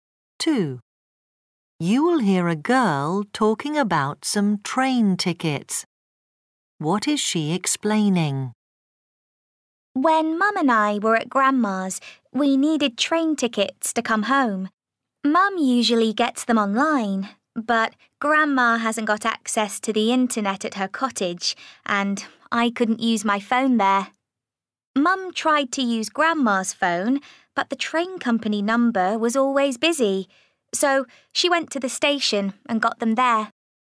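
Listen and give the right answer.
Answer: Her mum bought the train tickets at the station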